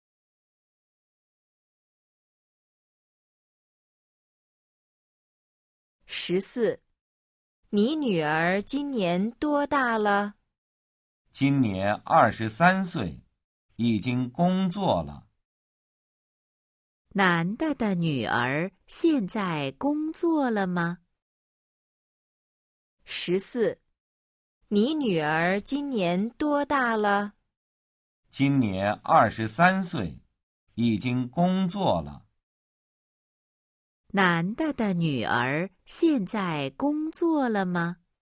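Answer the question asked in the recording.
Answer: 工作了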